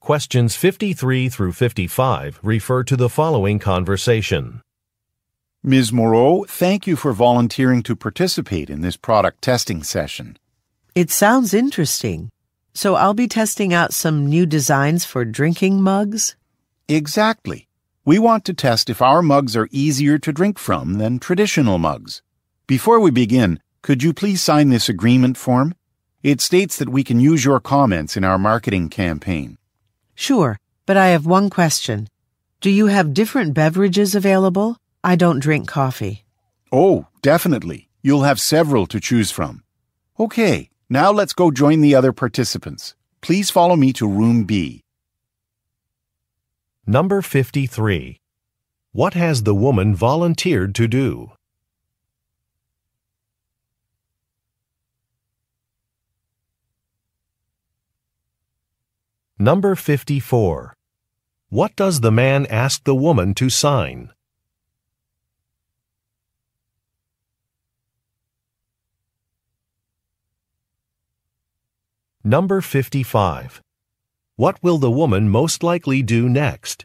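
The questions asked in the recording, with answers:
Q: What has the woman volunteered to do?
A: Test new drinking mug designs

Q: What does the man ask the woman to sign?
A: An agreement form allowing use of her comments in marketing

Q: What will the woman most likely do next?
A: Go to room B to join the other participants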